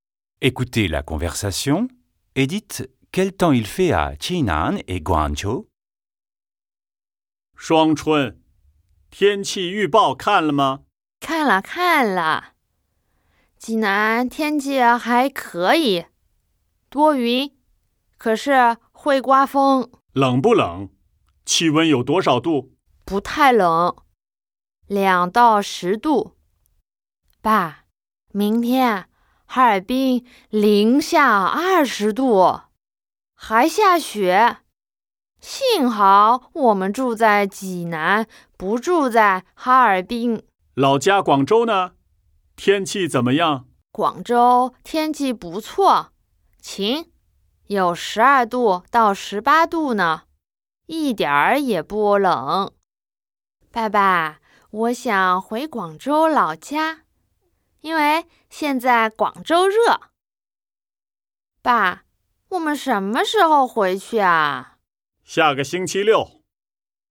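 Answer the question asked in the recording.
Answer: Jinan : nuageux et venteux, 2 à 10 degrés ; Guangzhou : ensoleillé, 12 à 18 degrés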